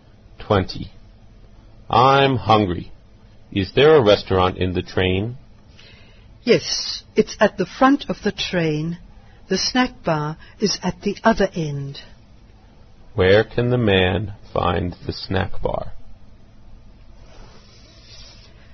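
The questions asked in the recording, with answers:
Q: Where can the man find the snack bar?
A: At the back (rear end) of the train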